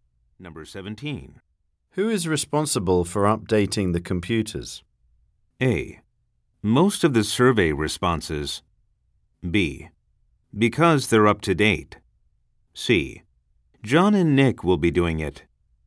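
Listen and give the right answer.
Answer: C: John and Nick will be doing it.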